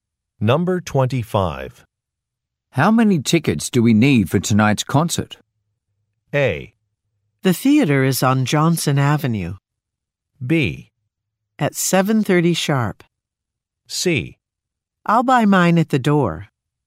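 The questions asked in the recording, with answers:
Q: How many tickets do we need for tonight's concert?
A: C: I'll buy mine at the door.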